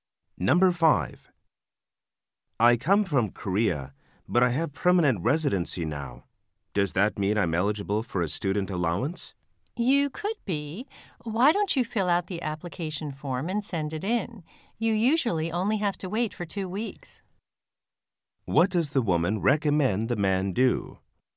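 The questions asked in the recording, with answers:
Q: What does the woman recommend the man do?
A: Fill out the application form and send it in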